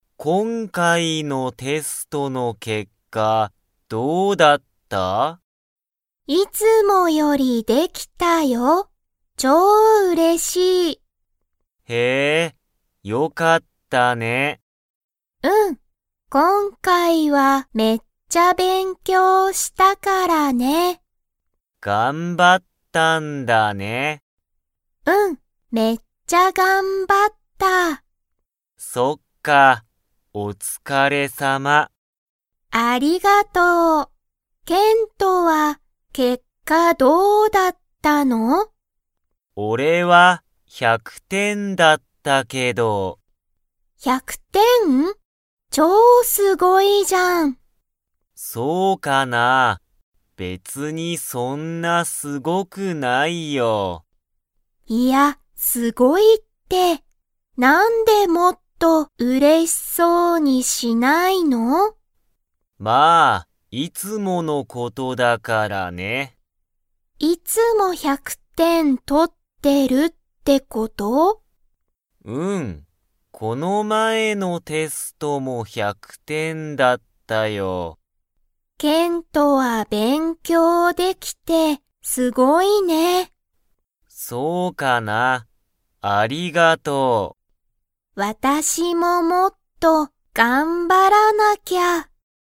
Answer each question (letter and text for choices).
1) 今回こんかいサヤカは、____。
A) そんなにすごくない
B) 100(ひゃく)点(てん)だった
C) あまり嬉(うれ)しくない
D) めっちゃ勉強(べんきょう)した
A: D) めっちゃ勉強(べんきょう)した

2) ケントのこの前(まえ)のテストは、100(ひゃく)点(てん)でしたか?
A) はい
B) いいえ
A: A) はい

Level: Level 2